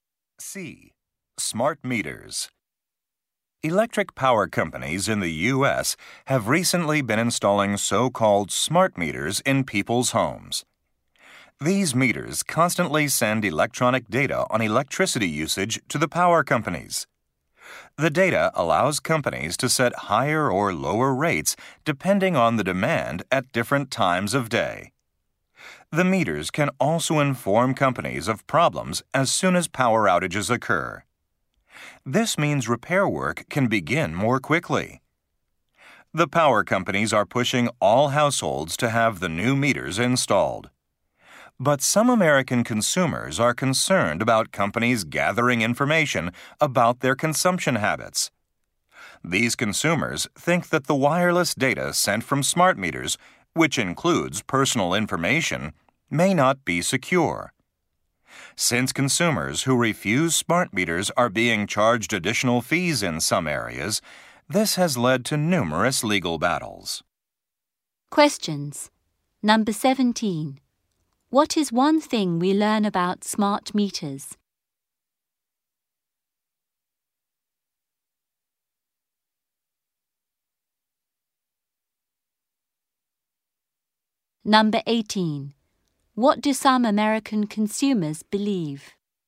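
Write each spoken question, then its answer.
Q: What is one thing we learn about smart meters?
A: They let power companies learn about power outages right away, so repairs can start sooner.

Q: What do some American consumers believe?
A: The personal data sent by smart meters may not be secure.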